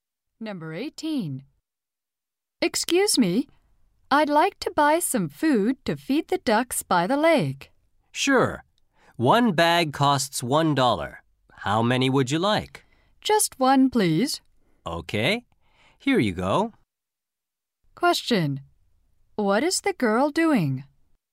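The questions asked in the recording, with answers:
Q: What is the girl doing?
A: Buying food to feed the ducks.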